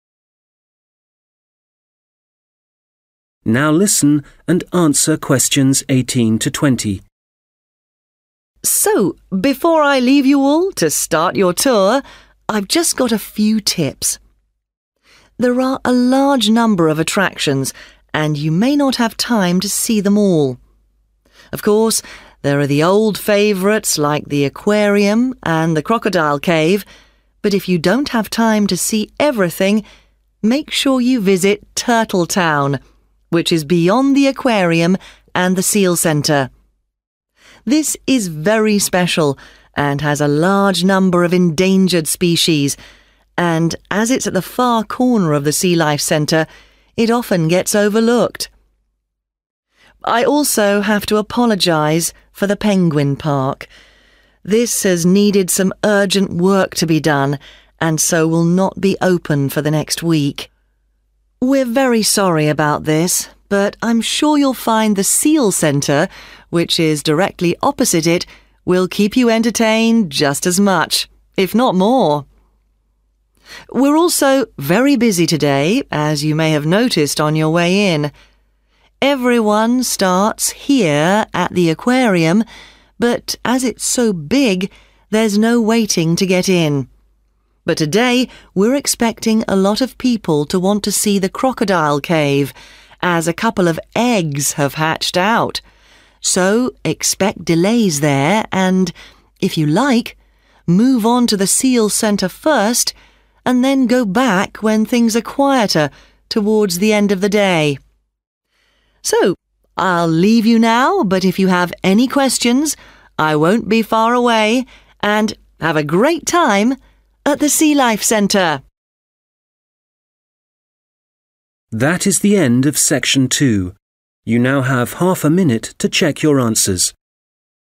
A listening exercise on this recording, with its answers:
Questions 18-20 What does the guide say about each attraction? Choose THREE answers from the box and write the correct letter, A-E, next to Questions 18-20.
must not miss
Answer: Turtle Town

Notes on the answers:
But if you don't have time to see everything, make sure (must not miss) you visit Turtle Town [Nhưng nếu bạn không có thời gian để xem tất cả mọi thứ, thì hãy nhớ ghé thăm Thị trấn Rùa] (=> E)

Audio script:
So before I leave you all to start your tour, I've just got a few tips. There are a large number of attractions, and you may not have time to see them all. Of course, there are the old favorites, like the aquarium and the Crocodile Cave. This is very special and has a large number of endangered species, and as it's at the far corner of the Sea Life Centre, it often gets overlooked. (Q19) I also have to apologize for the Penguin Park (=> C). This has needed some urgent work to be done and so will not be open for the next week (= temporarily closed) [Tôi cũng phải xin lỗi vì Công viên Chim Cánh Cụt. We're very sorry about this, but I'm sure you'll find the Seal center, which is directly opposite. It will keep you entertained just as much if not more.
We're also very busy today, as you may have noticed on your way in. Everyone starts here at the aquarium, but as it's so big, there's no waiting to get in. (Q20) But today we're expecting a lot of people to want to see the crocodile cave as a couple of eggs have hatched out. And if you like, move on to the seal center first and then go back when things are quieter towards the end of the day.
So I'll leave you now. But if you have any questions, I won't be far away and have a great time at the Sea Life Centre.